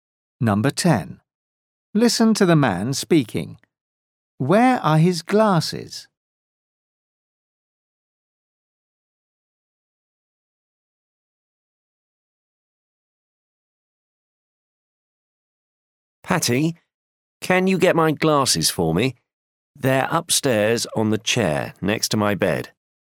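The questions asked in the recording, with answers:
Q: Where are his glasses?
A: upstairs on the chair next to his bed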